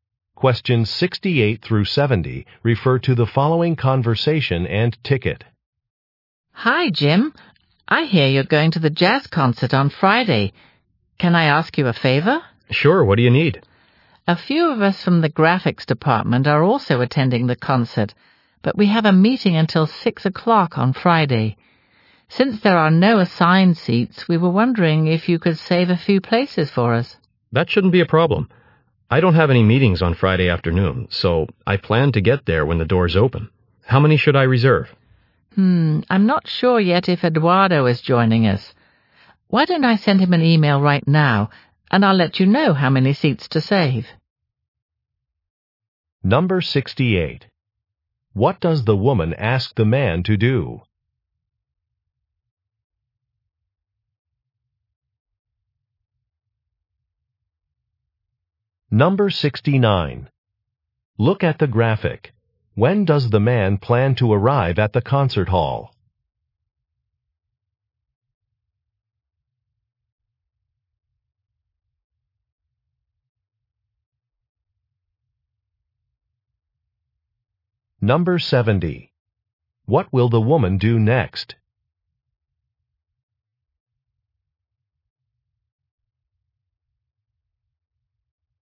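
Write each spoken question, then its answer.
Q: What does the woman ask the man to do?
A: Save seats for her group

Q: What will the woman do next?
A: Send Eduardo an email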